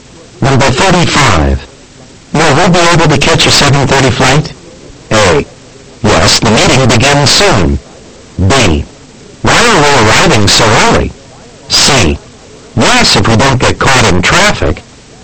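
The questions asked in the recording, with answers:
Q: Will we be able to catch a 7:30 flight?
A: C: Yes, if we don't get caught in traffic.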